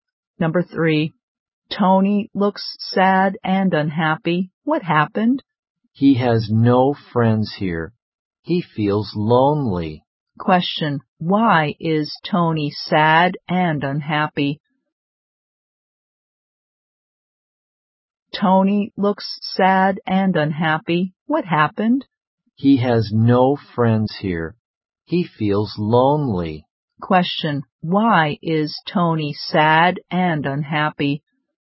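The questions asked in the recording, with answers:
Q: why is Tony sad and unhappy?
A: He has no friends here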